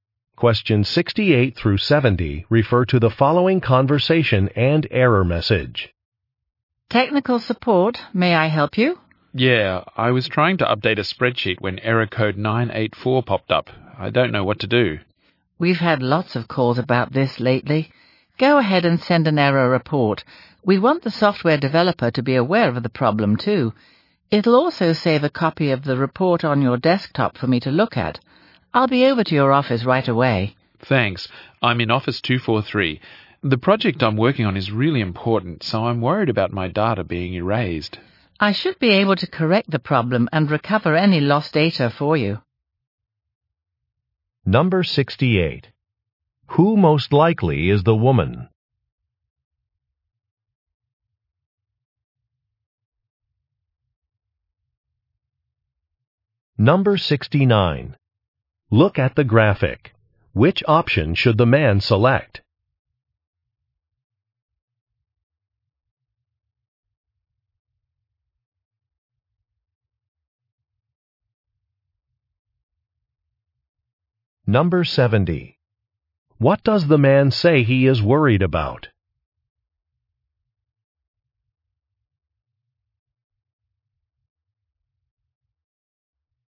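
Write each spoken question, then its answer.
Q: Who most likely is the woman?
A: A technical support worker

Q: What does the man say he is worried about?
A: Losing his data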